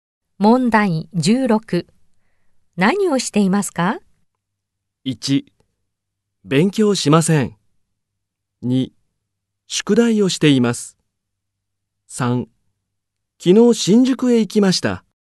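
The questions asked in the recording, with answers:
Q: 何をしていますか?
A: 2: 宿題をしています。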